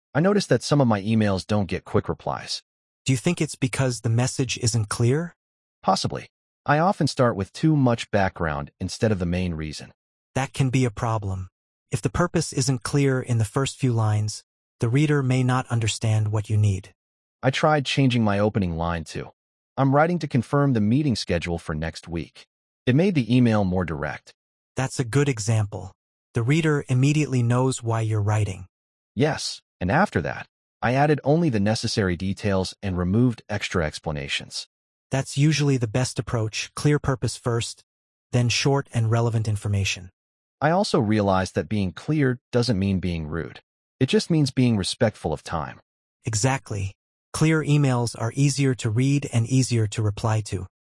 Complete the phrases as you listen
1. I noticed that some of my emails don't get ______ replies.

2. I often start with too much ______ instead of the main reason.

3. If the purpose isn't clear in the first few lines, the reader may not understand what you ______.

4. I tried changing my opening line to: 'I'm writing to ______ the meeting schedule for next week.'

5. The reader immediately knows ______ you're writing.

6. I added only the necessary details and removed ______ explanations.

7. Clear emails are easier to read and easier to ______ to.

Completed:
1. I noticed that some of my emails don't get quick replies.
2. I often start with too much background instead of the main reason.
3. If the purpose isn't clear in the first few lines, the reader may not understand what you need.
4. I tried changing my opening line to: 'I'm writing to confirm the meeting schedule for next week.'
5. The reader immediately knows why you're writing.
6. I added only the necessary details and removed extra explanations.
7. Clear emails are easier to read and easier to reply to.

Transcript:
David: I noticed that some of my emails don't get quick replies.
Michael: Do you think it's because the message isn't clear?
David: Possibly. I often start with too much background instead of the main reason.
Michael: That can be a problem. If the purpose isn't clear in the first few lines, the reader may not understand what you need.
David: I tried changing my opening line to: "I'm writing to confirm the meeting schedule for next week." It made the email more direct.
Michael: That's a good example. The reader immediately knows why you're writing.
David: Yes, and after that, I added only the necessary details and removed extra explanations.
Michael: That's usually the best approach clear purpose first, then short and relevant information.
David: I also realized that being clear doesn't mean being rude. It just means being respectful of time.